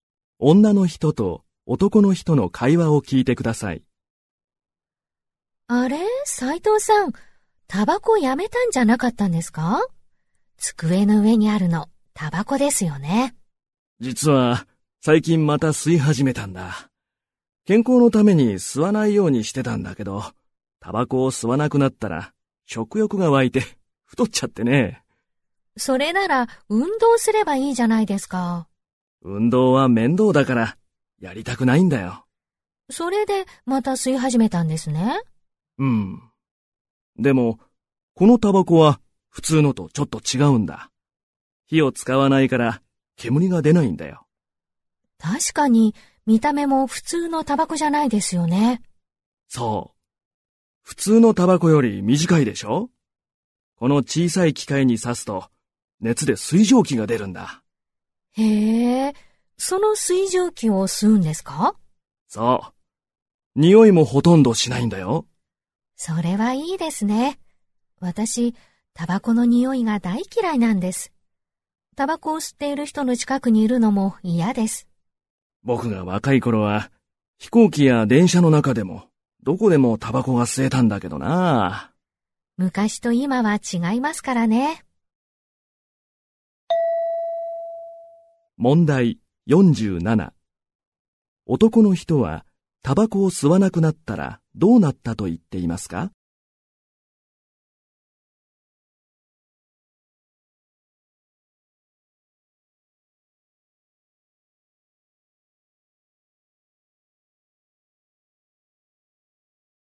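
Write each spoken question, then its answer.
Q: 男の人はタバコを吸わなくなったらどうなったと言っていますか?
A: 食欲が湧いて太った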